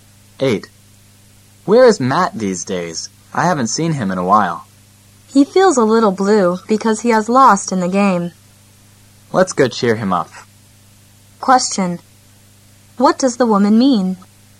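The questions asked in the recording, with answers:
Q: What does the woman mean?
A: They should go cheer Matt up because he is sad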